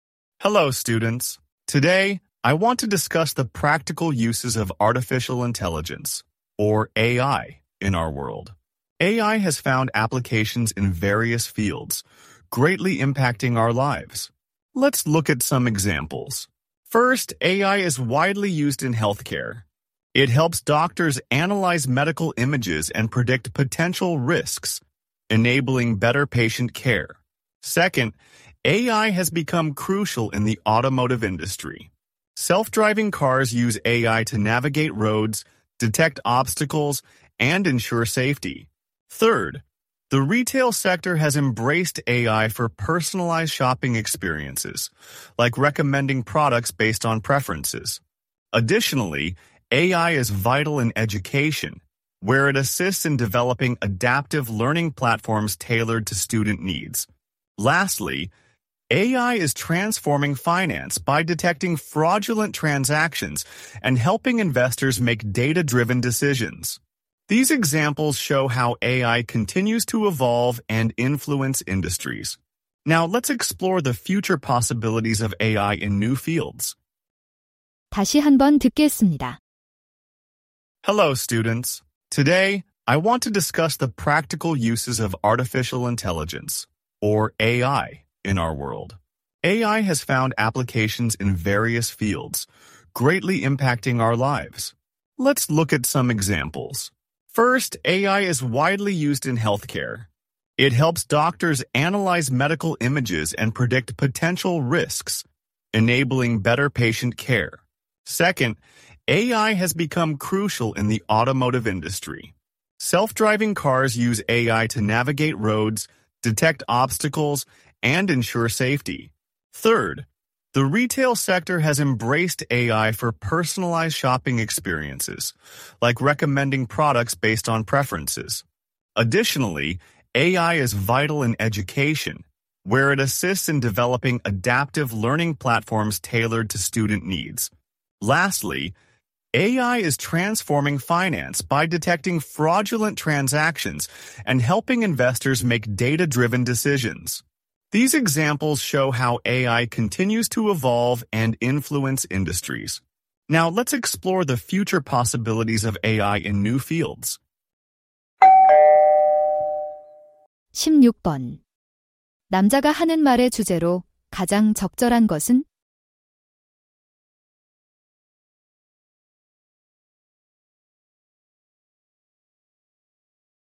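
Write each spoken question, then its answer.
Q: 남자가 하는 말의 주제로 가장 적절한 것은?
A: 여러 분야에서의 인공지능의 실제 활용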